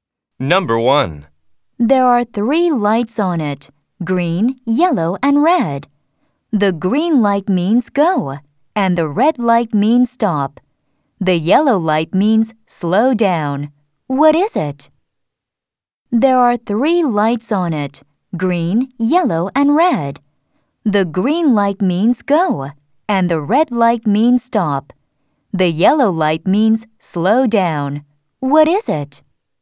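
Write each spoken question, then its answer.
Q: What is it?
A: a traffic light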